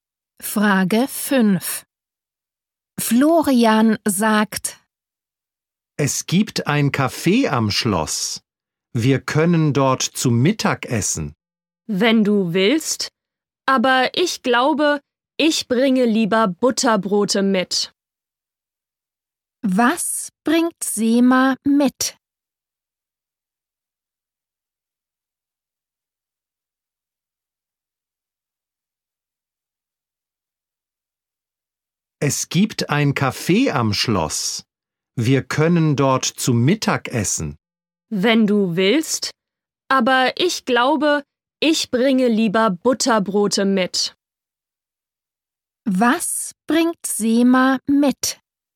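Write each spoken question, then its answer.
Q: Was bringt Sema mit?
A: Butterbrote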